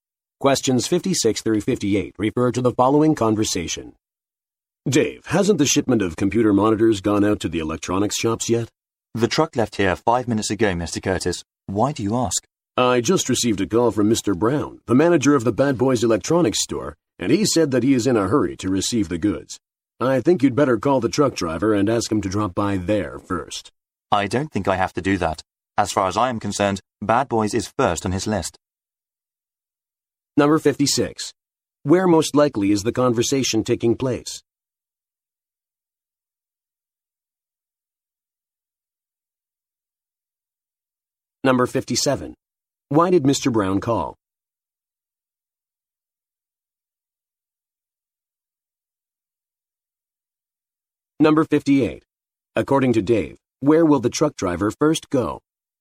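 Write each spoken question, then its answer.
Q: Why did Mr. Brown call?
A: He is in a hurry to receive the goods

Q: According to Dave, where will the truck driver first go?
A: The Bad Boys Electronics store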